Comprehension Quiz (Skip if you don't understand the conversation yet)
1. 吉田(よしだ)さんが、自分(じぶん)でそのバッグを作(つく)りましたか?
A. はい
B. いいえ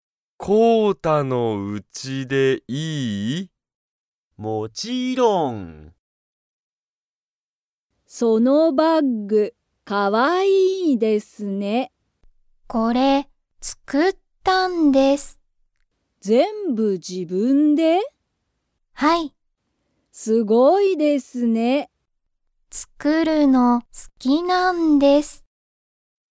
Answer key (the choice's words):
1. はい

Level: Level 1